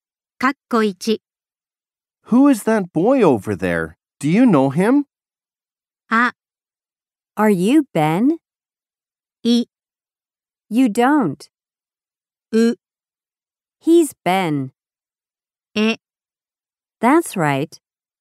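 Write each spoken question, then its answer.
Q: Who is that boy over there? Do you know him?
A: う: He's Ben.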